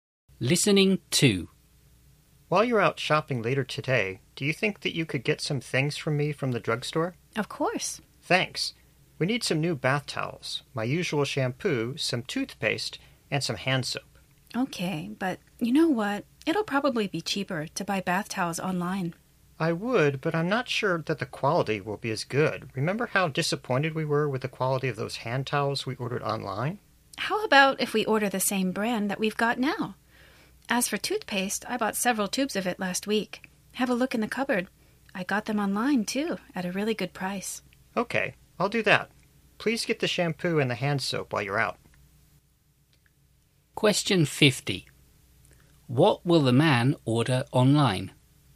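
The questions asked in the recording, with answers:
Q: What will the man order online?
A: Bath towels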